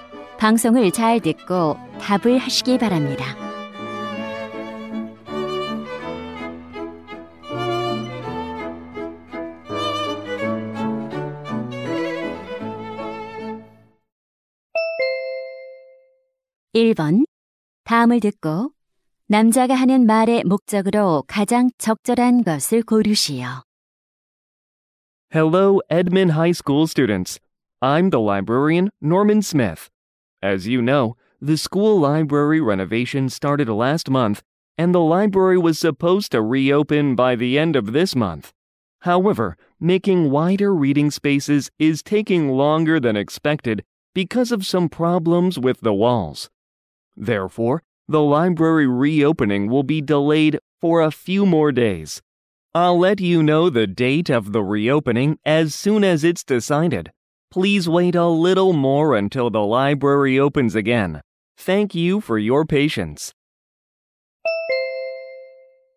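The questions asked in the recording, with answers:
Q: 다음을 듣고 남자가 하는 말의 목적으로 가장 적절한 것을 고르시오.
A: 도서관 재개관이 며칠 더 늦어짐을 알리려고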